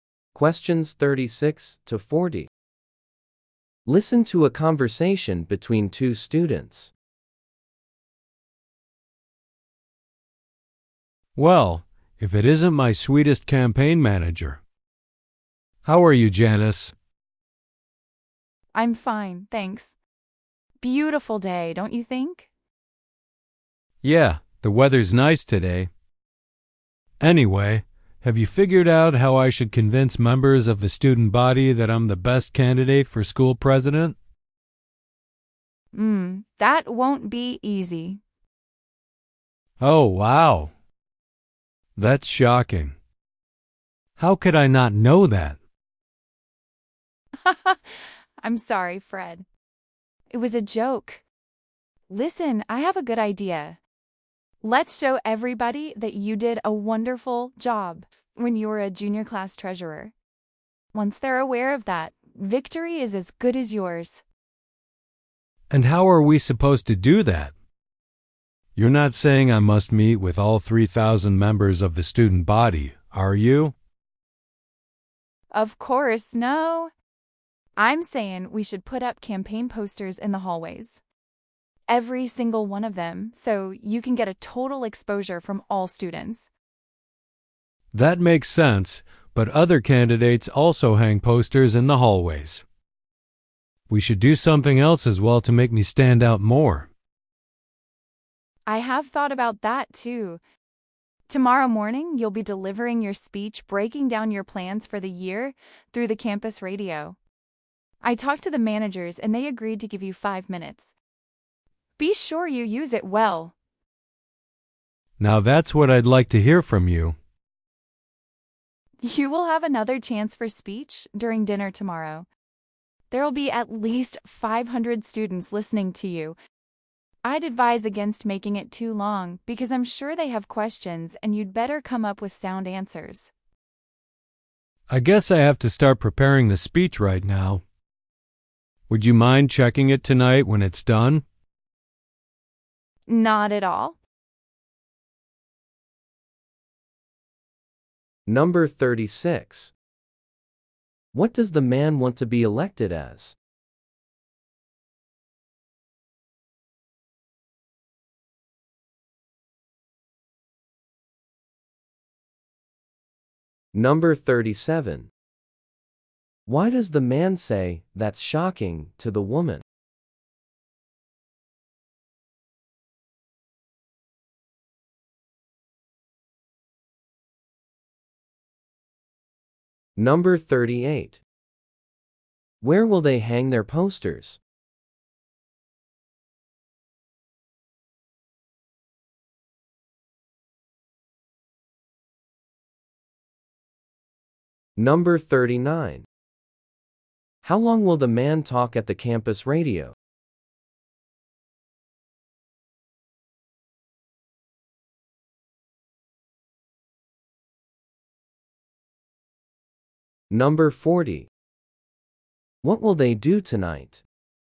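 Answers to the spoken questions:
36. School president.
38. In the hallways.
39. 5 minutes.
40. The woman will check the man's speech.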